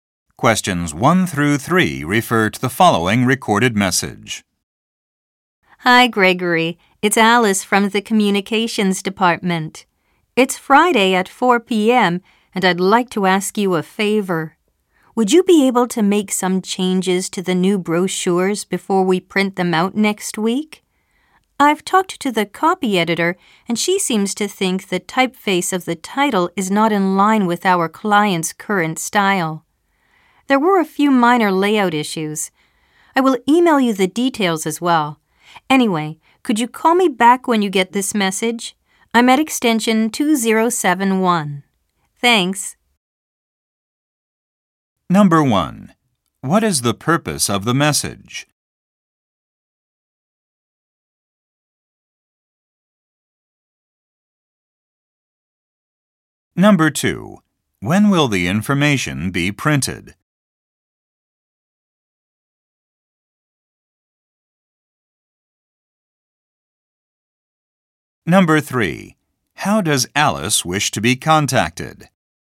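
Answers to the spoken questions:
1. To ask Gregory to make changes to the new brochures
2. Next week
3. By phone call back at extension 2071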